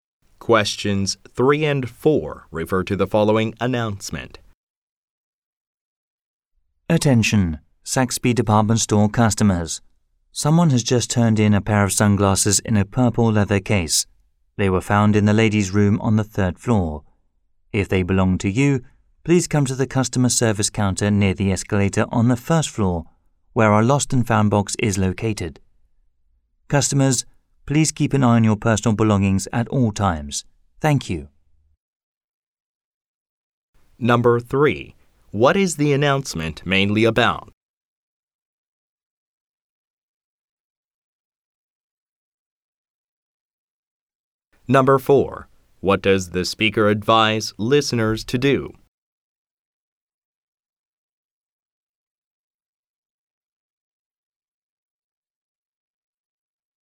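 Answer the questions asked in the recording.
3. Sunglasses someone found and turned in
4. Keep an eye on their personal belongings at all times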